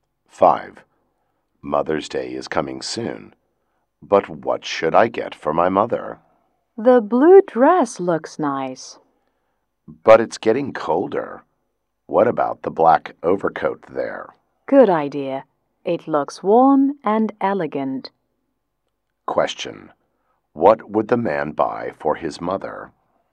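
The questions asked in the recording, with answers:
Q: What would the man buy for his mother?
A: The black overcoat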